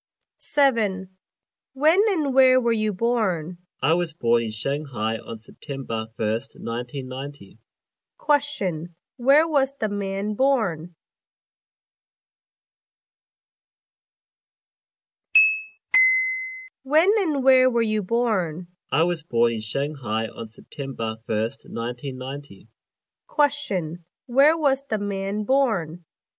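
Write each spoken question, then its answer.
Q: Where was the man born?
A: In Shanghai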